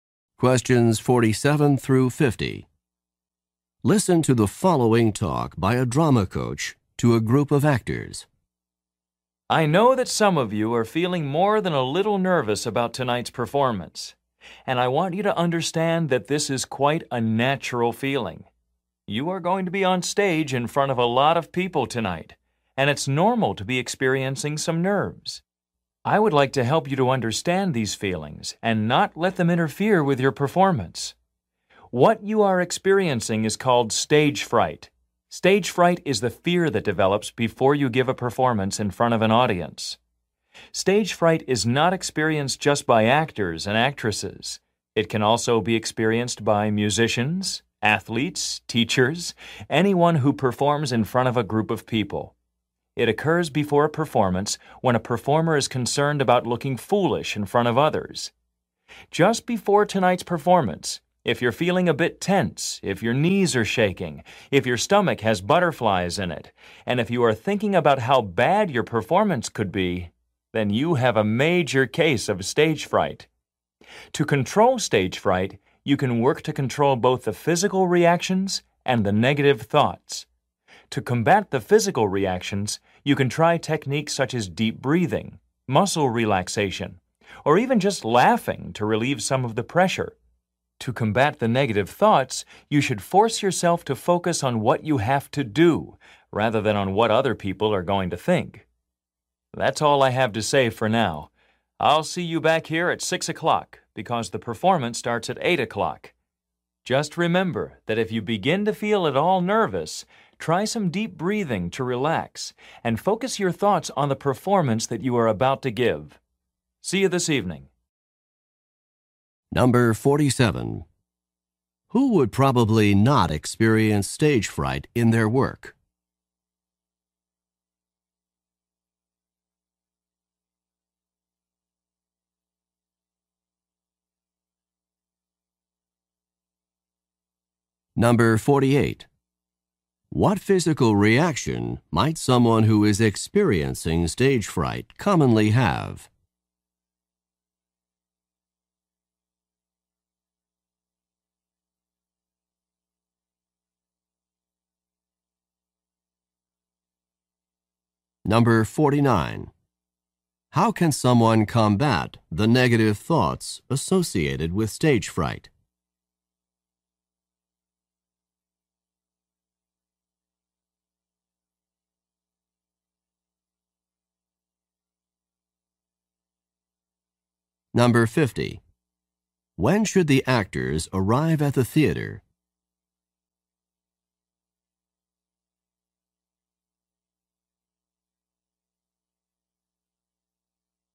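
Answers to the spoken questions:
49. Focus on what they have to do, not on what others will think
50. At 6 o'clock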